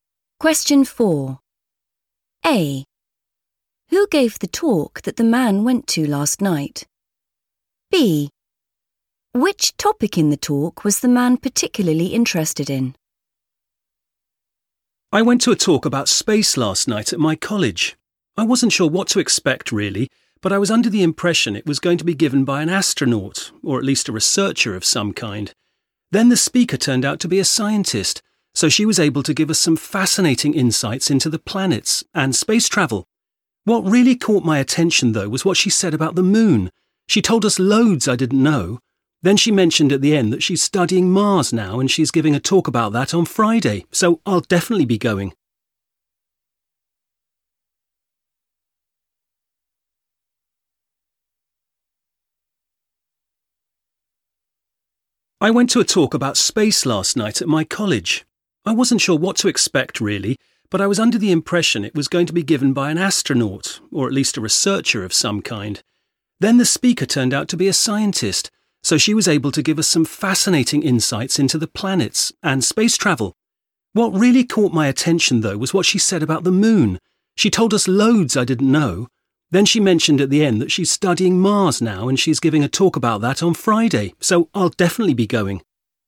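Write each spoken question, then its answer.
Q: A. Who gave the talk that the man went to last night?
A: a scientist

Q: B. Which topic in the talk was the man particularly interested in?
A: the moon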